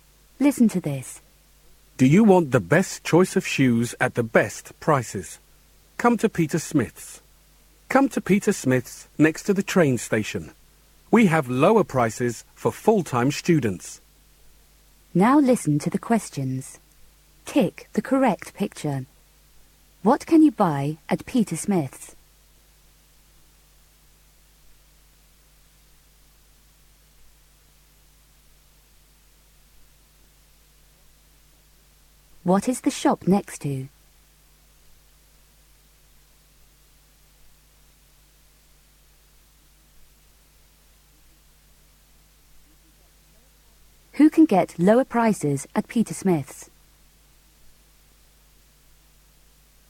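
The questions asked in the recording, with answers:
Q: What can you buy at Peter Smith's?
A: Shoes

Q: What is the shop next to?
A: The train station

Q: Who can get lower prices at Peter Smith's?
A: Full-time students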